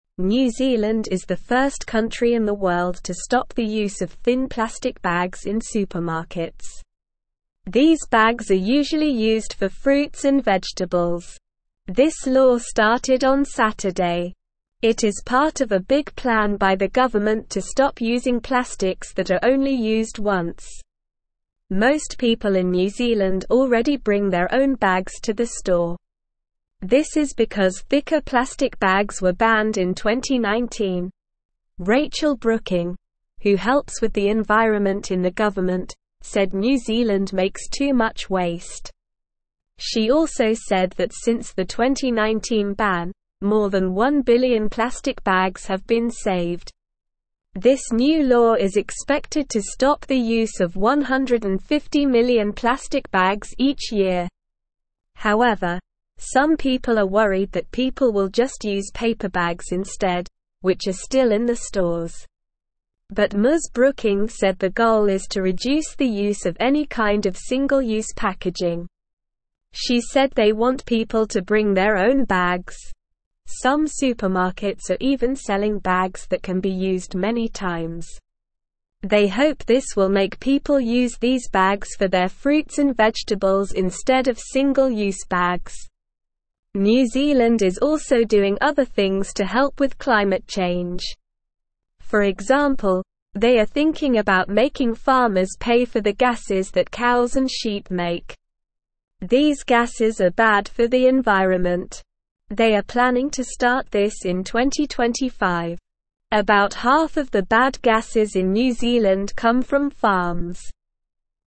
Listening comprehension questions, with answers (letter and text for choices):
Multiple Choice Questions:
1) Which country is the first to stop using thin plastic bags in supermarkets?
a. Australia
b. New Zealand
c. Canada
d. United States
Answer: b. New Zealand

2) What were these thin plastic bags usually used for?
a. Fruits and vegetables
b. Meat and fish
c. Canned goods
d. Cleaning supplies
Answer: a. Fruits and vegetables

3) When did the law to stop using thin plastic bags start?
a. Sunday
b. Monday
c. Friday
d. Saturday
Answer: d. Saturday

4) What was banned in New Zealand in 2019?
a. Paper bags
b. Thicker plastic bags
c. Glass bottles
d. Aluminum cans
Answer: b. Thicker plastic bags

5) Who said that New Zealand makes too much waste?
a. The president of New Zealand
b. A school teacher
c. A supermarket owner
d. Rachel Brooking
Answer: d. Rachel Brooking

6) How many plastic bags have been saved since the 2019 ban?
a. More than one million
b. More than one hundred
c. More than one billion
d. More than one thousand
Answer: c. More than one billion

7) What is the goal of the new law according to Ms. Brooking?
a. To make people buy more fruits and vegetables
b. To reduce the use of any kind of single-use packaging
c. To make supermarkets sell more reusable bags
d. To make people use more paper bags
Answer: b. To reduce the use of any kind of single-use packaging

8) What is New Zealand planning to do in 2025 to help with climate change?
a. Make farmers pay for the gases that cows and sheep make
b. Ban all plastic products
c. Plant more trees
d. Stop using cars and buses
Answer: a. Make farmers pay for the gases that cows and sheep make

True or False Questions:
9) New Zealand is the first country to stop using thin plastic bags in stores.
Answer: True

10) The law to stop using thin plastic bags started on Monday.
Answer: False

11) People in New Zealand started bringing their own bags to the store in 2019.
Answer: True

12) Rachel Brooking said New Zealand makes very little waste.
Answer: False

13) The new law will stop the use of 150 million plastic bags each year.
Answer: True

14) Ms. Brooking said they want people to use more single-use packaging.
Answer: False

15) Some supermarkets in New Zealand are selling bags that can be used many times.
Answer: True

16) New Zealand is thinking about making farmers pay for the gases that cows and sheep make in 2030.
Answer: False

Listen and Fill in the Gaps:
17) New Zealand is the first country in the world to stop the use of thin plastic bags in (1)______.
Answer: supermarkets

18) This law started on (2)______.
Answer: Saturday

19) This is because thicker plastic bags were banned in (3)______.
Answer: 2019

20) This new law is expected to stop the use of 150 million plastic bags each (4)______.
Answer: year

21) They hope this will make people use these bags for their fruits and vegetables instead of (5)______ bags.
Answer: single-use

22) They are planning to start this in (6)______.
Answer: 2025

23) About half of the bad gases in New Zealand come from (7)______.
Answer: farms

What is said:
New Zealand is the first country in the world to stop the use of thin plastic bags in supermarkets. These bags are usually used for fruits and vegetables. This law started on Saturday. It is part of a big plan by the government to stop using plastics that are only used once. Most people in New Zealand already bring their own bags to the store. This is because thicker plastic bags were banned in 2019.
Rachel Brooking, who helps with the environment in the government, said New Zealand makes too much waste. She also said that since the 2019 ban, more than one billion plastic bags have been saved. This new law is expected to stop the use of 150 million plastic bags each year.
However, some people are worried that people will just use paper bags instead, which are still in the stores. But Ms. Brooking said the goal is to reduce the use of any kind of single-use packaging. She said they want people to bring their own bags. Some supermarkets are even selling bags that can be used many times. They hope this will make people use these bags for their fruits and vegetables instead of single-use bags.
New Zealand is also doing other things to help with climate change. For example, they are thinking about making farmers pay for the gases that cows and sheep make. These gases are bad for the environment. They are planning to start this in 2025. About half of the bad gases in New Zealand come from farms.

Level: Level 1